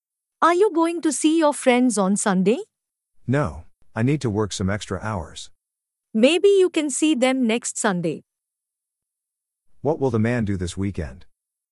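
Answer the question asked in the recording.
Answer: Work extra hours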